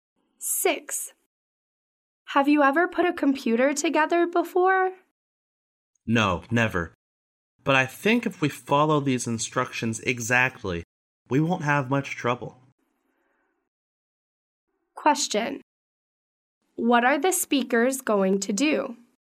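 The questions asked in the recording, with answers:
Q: What are the speakers going to do?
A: Put a computer together.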